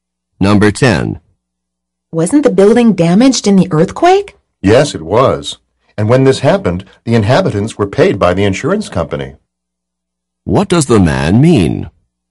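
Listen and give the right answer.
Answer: The insurance company paid the inhabitants for the damage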